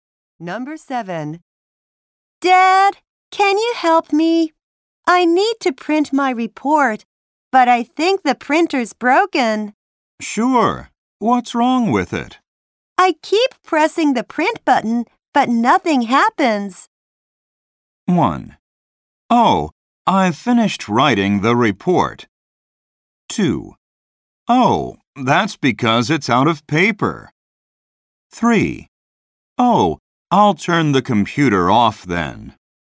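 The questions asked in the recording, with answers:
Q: I keep pressing the print button, but nothing happens.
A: 2: Oh, that's because it's out of paper.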